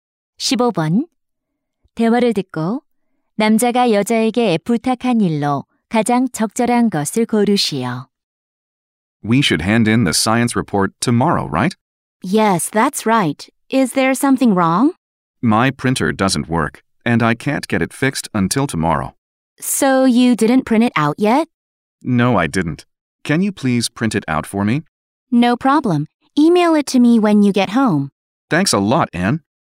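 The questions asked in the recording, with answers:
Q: 대화를 듣고 남자가 여자에게 부탁한 일로 가장 적절한 것을 고르시오.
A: 과학 보고서 출력해 주기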